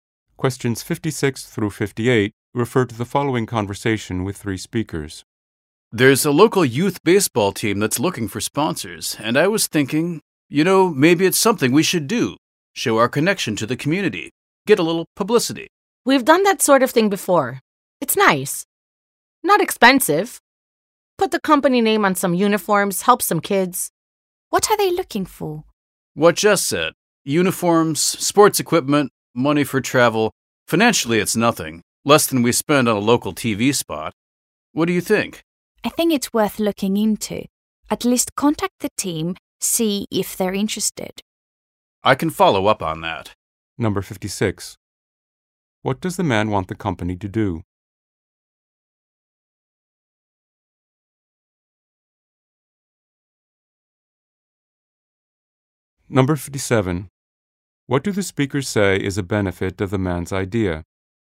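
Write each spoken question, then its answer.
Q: What does the man want the company to do?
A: Sponsor a local youth baseball team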